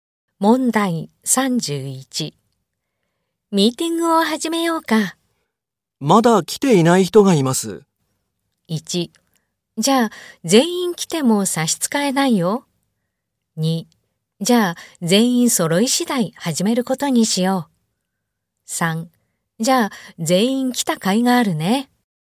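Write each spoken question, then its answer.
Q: ミーティングを始めようか。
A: 2: じゃあ、全員揃い次第始めることにしよう。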